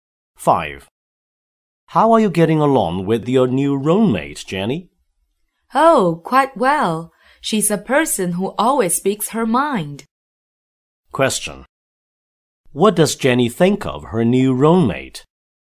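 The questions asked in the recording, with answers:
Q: What does Jenny think of her new roommate?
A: She is frank and honest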